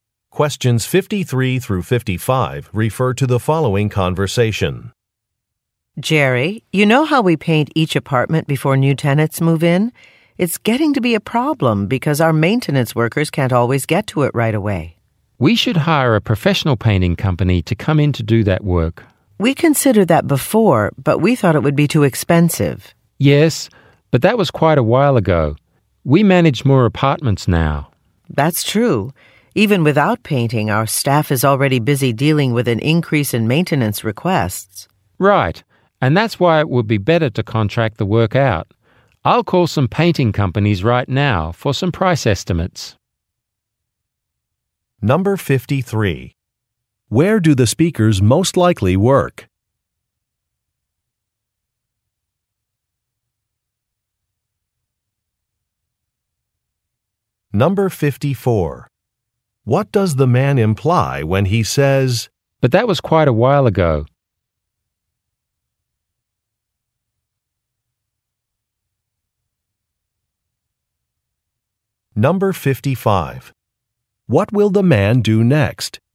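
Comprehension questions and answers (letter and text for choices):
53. Where do the speakers most likely work?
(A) At a moving company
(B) At a construction firm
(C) At an apartment management office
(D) At a commercial cleaning service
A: (C) At an apartment management office

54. What does the man imply when he says, "but that was quite a while ago"?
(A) A deadline is approaching.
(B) A procedure has been improved.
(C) A decision should be reconsidered.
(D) A database should be updated.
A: (C) A decision should be reconsidered.

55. What will the man do next?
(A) Review some applications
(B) Inspect some properties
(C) Make some deliveries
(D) Research some prices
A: (D) Research some prices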